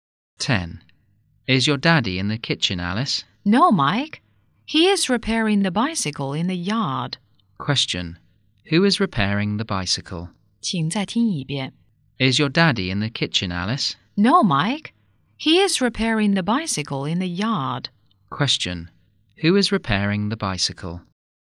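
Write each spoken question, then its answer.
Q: Who is repairing the bicycle?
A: Alice's father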